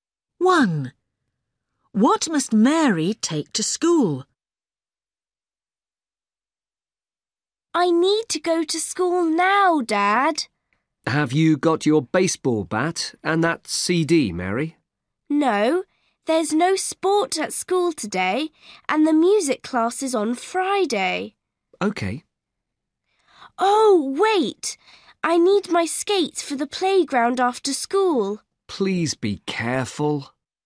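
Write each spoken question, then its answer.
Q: What must Mary take to school?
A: Her skates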